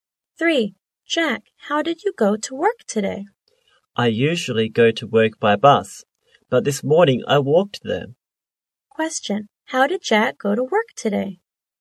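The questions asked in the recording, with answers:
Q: Question, how did Jack go to work today?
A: He walked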